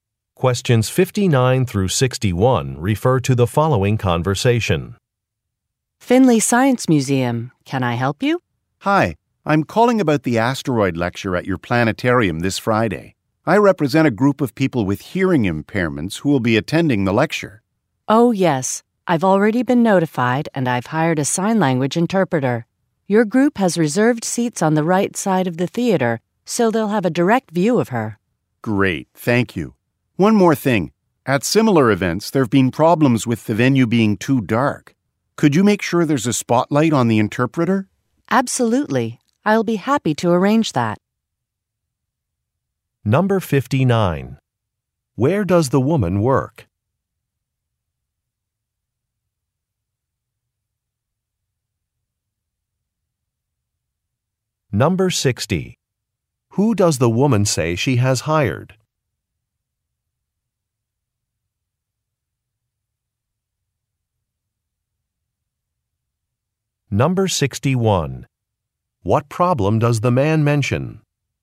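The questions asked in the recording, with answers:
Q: Where does the woman work?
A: At a science museum

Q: Who does the woman say she has hired?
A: A sign language interpreter

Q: What problem does the man mention?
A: Venues have been too dark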